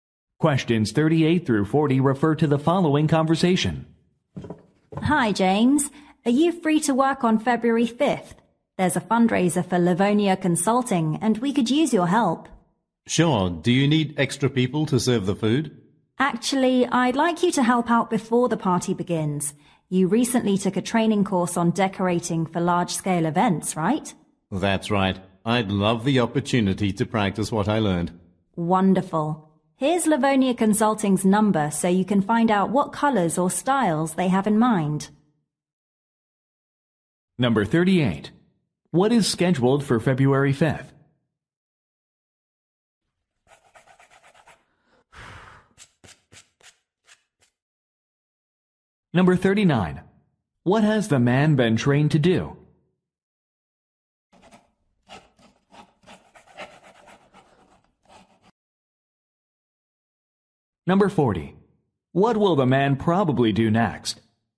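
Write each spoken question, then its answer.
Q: What is scheduled for February 5th?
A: A fundraiser party for Livonia Consulting

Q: What has the man been trained to do?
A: Decorate for large-scale events

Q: What will the man probably do next?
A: Call Livonia Consulting about colors and styles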